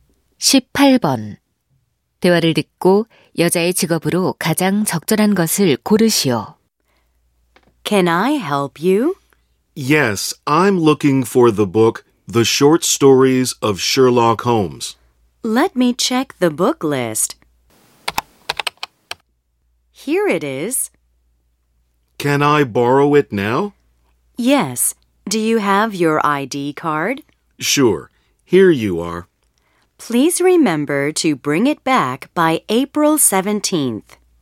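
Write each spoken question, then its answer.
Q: 대화를 듣고 여자의 직업으로 가장 적절한 것을 고르시오.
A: 사서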